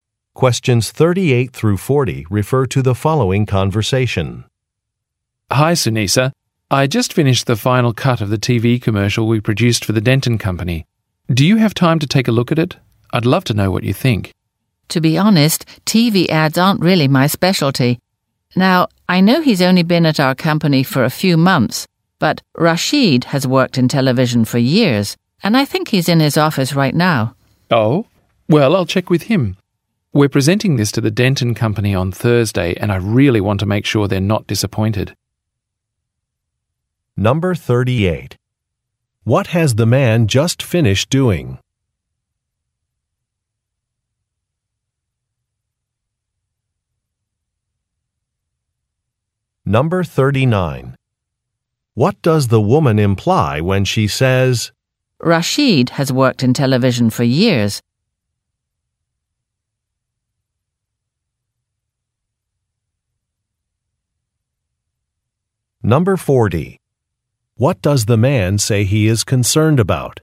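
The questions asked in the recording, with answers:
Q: What has the man just finished doing?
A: The final cut of a TV commercial for the Denton Company

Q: What does the woman imply when she says, Rashid has worked in television for years?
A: Rashid would be better qualified to review the commercial

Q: What does the man say he is concerned about?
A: That the Denton Company might be disappointed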